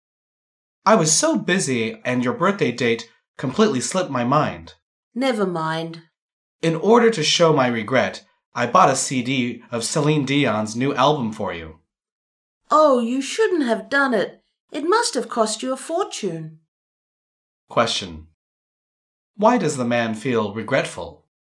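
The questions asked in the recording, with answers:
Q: Why does the man feel regretful?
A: He forgot the woman's birthday.

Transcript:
[听力原文] M: I was so busy and your birthday date completely slipped my mind. W: Never mind. M: In order to show my regret, I bought a CD of Celine Dion's new album for you. W: Oh, you shouldn't have done it! It must have cost you a fortune. Q: Why does the man feel regretful?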